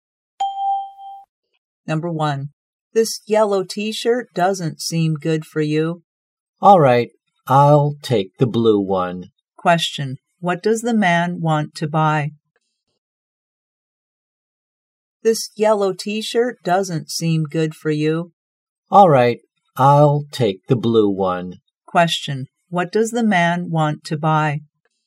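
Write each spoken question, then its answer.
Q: What does the man want to buy?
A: The blue T-shirt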